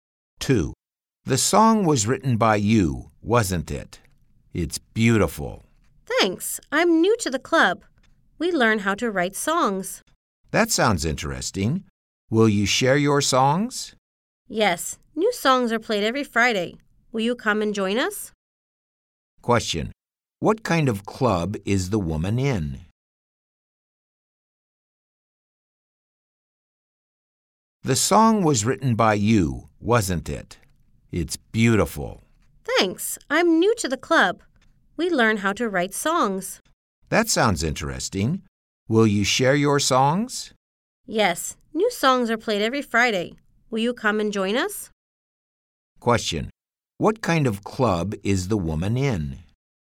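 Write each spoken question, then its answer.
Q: What kind of club is the woman in?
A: A songwriting club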